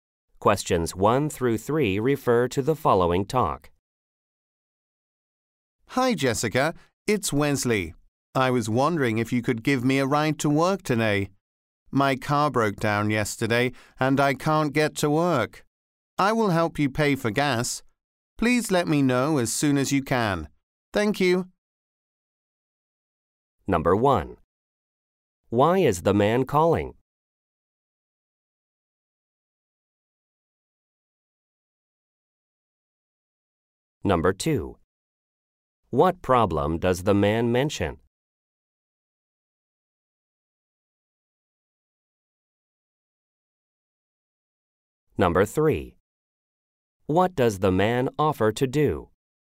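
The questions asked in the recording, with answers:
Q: Why is the man calling?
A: To ask for a ride to work

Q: What problem does the man mention?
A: His car broke down

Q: What does the man offer to do?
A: Help pay for gas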